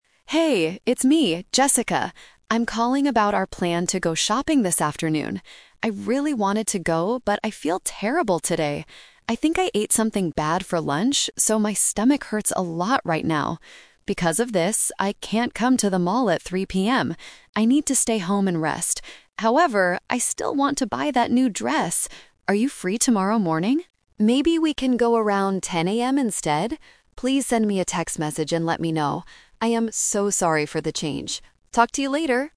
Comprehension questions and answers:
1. What did the friends plan to do this afternoon?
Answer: Go shopping

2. Why is Jessica staying home today?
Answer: She is feeling sick.

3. When does Jessica want to go to the mall instead?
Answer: Tomorrow at 10:00 AM

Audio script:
Jessica (Voicemail): Hey! It's me, Jessica. I'm calling about our plan to go shopping this afternoon. I really wanted to go, but I feel terrible today. I think I ate something bad for lunch, so my stomach hurts a lot right now. Because of this, I can't come to the mall at 3:00 PM. I need to stay home and rest. However, I still want to buy that new dress! Are you free tomorrow morning? Maybe we can go around 10:00 AM instead? Please send me a text message and let me know. I am so sorry for the change. Talk to you later!

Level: A2